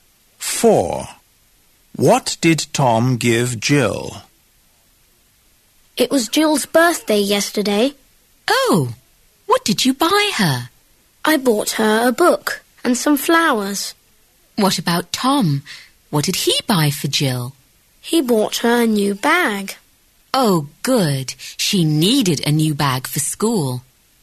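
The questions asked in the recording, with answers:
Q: What did Tom give Jill?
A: A new bag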